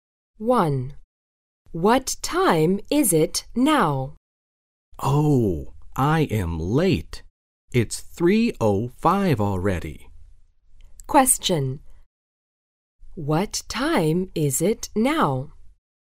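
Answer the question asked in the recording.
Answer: 3:05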